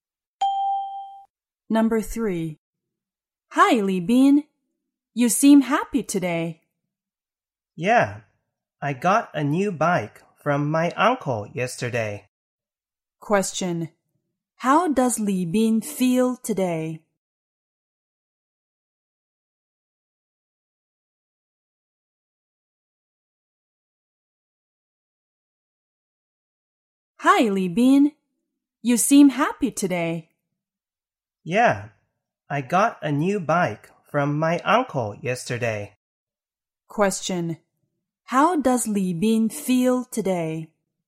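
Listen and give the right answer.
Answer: Happy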